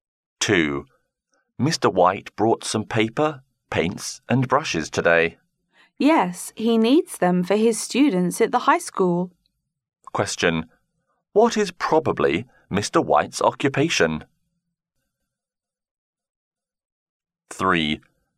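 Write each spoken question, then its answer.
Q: What is probably Mr. White's occupation?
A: A high school (art) teacher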